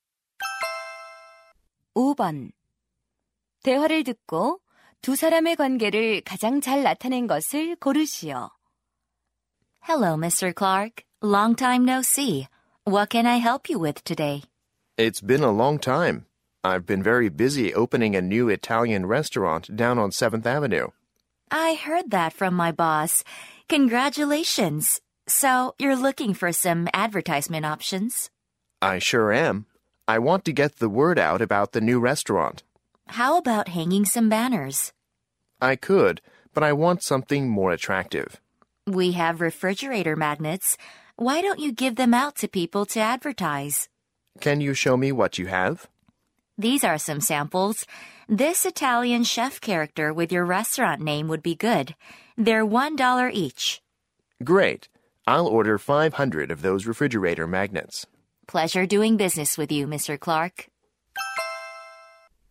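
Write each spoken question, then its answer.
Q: 대화를 듣고 두 사람의 관계를 가장 잘 나타낸 것을 고르시오.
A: 광고물 판매 직원 - 식당 주인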